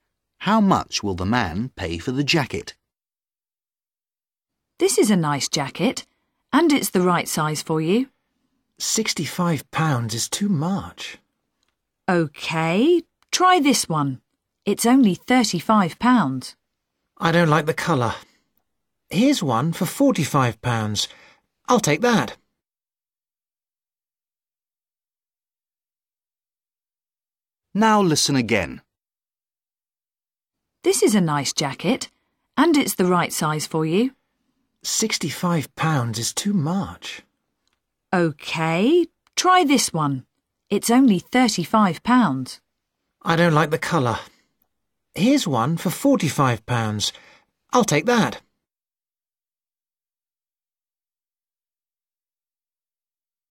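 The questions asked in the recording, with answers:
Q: How much will the man pay for the jacket?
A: £45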